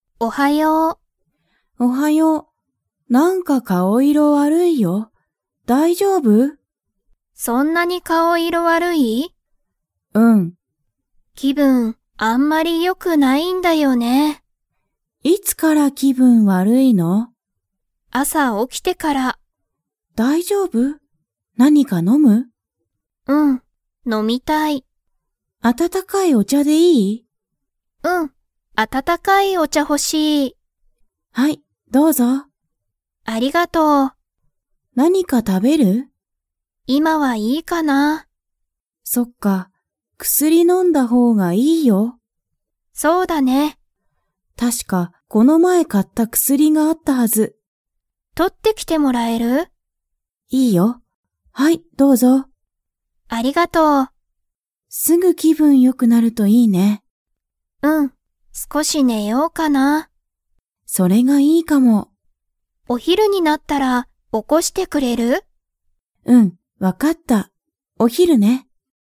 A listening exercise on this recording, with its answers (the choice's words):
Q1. かおりは、いつから気分きぶんが悪わるいですか?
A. 朝あさ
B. 昨日きのう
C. 一週間いっしゅうかん前まえ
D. お昼ひる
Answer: 朝あさ

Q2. かおりは今いま、何なにか 。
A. 食たべる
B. 食たべない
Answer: 食たべない

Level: Level 4